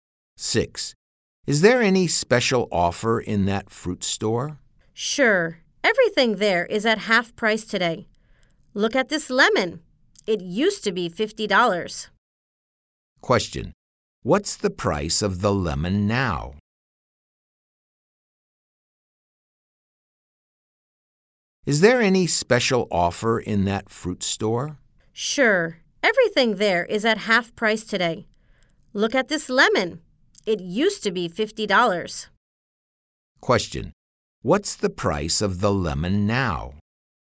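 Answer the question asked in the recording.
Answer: $25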